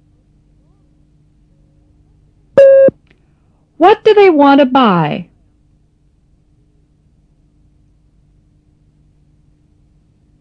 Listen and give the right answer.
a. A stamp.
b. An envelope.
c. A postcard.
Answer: a. A stamp.